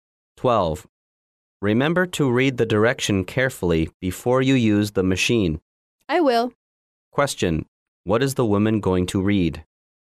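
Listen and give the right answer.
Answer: The directions for the machine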